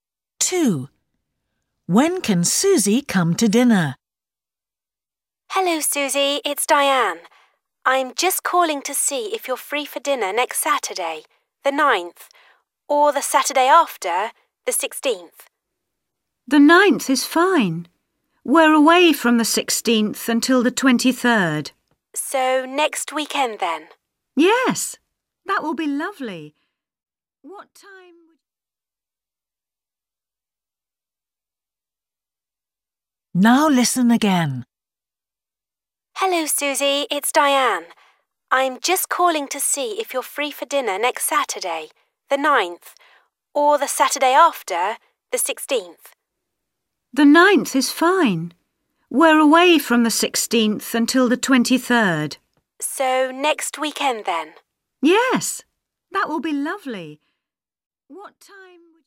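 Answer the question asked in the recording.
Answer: Next Saturday, the 9th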